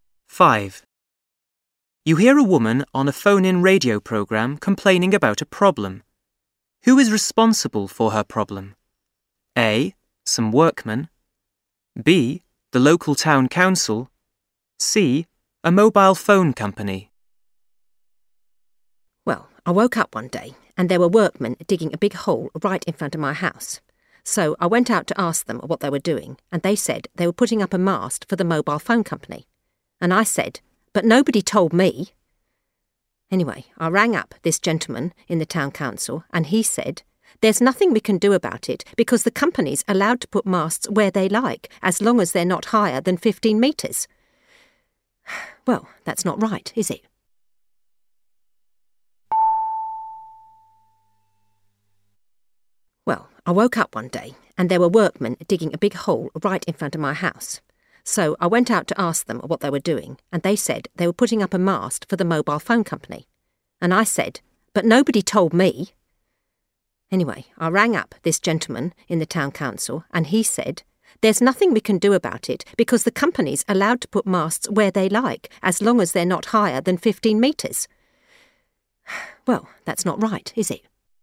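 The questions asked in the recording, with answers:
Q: Who is responsible for her problem?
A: C: A mobile phone company.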